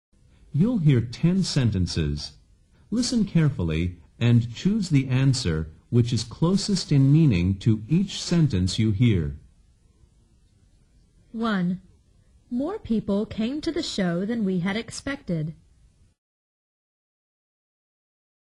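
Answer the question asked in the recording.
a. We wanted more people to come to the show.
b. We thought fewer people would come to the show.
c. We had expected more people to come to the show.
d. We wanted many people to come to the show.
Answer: b. We thought fewer people would come to the show.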